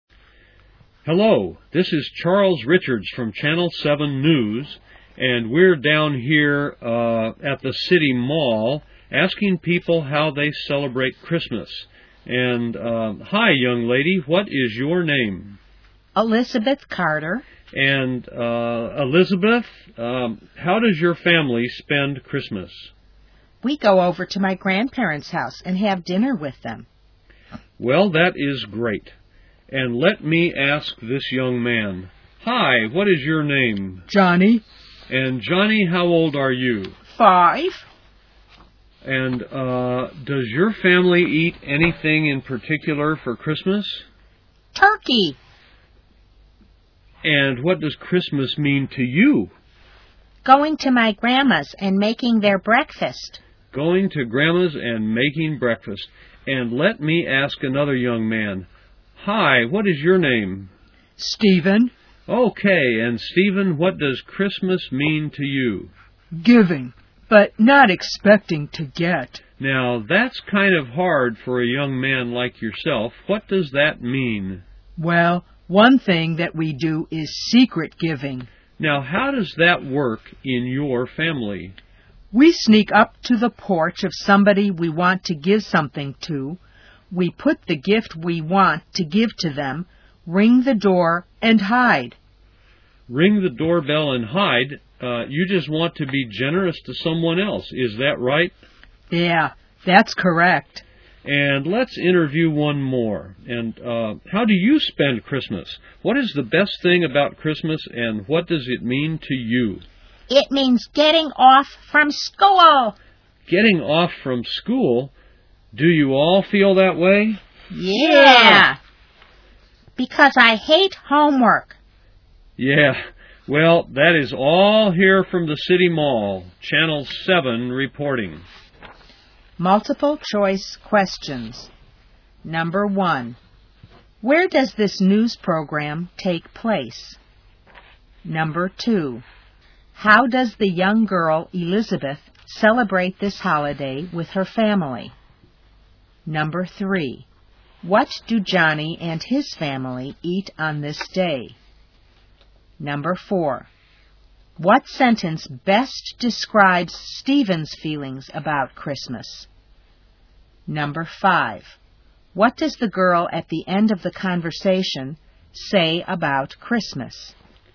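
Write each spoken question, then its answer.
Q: Where does this news program take place?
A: At the City Mall

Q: How does the young girl, Elizabeth, celebrate this holiday with her family?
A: They go to her grandparents' house and have dinner with them

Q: What do Johnny and his family eat on this day?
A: Turkey

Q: What sentence best describes Stephen's feelings about Christmas?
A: Christmas is about giving without expecting to get anything back

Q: What does the girl at the end of the conversation say about Christmas?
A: It means getting off from school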